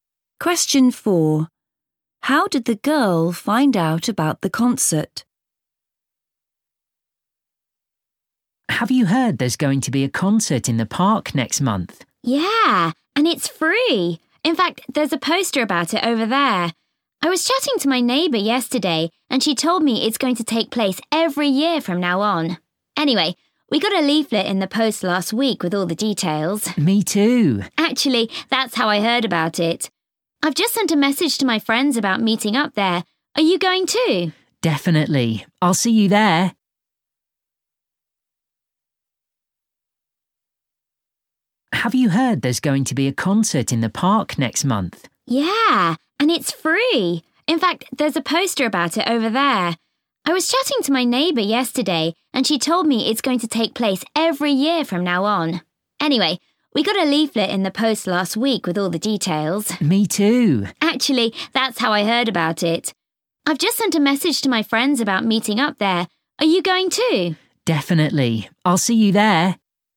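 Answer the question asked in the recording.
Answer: From a leaflet in the post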